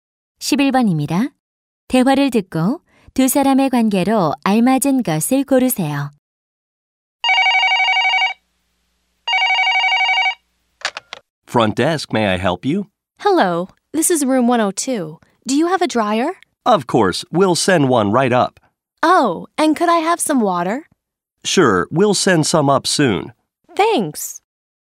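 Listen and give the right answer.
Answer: 호텔 직원과 투숙객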